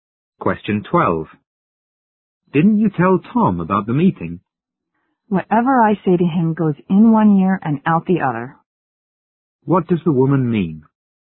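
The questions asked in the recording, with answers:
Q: What does the woman mean?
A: Tom never pays attention to what she says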